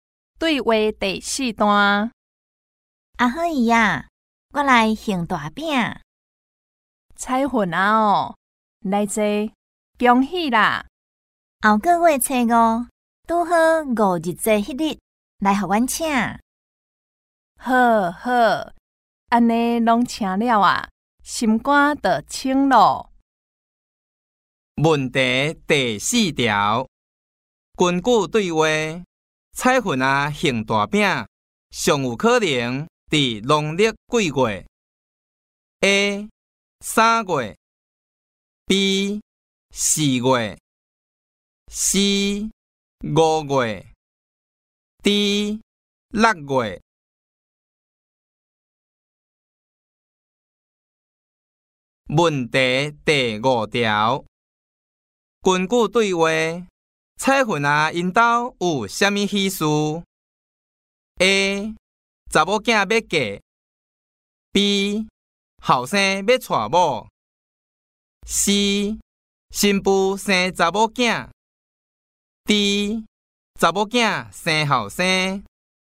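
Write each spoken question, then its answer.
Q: 根据对话,彩粉啊行大饼,上有可能伫农历几月 ?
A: B: 四月

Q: 根据对话,彩粉啊,因家有啥物喜事 ?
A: A: 查某囝要嫁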